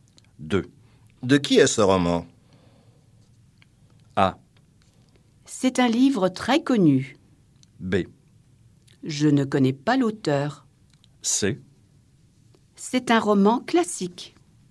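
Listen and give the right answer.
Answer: B: Je ne connais pas l'auteur.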